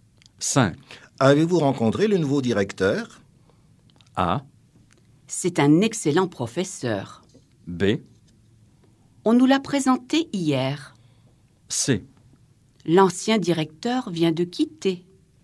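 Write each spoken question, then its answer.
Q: Avez-vous rencontré le nouveau directeur?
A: B: On nous l'a présenté hier.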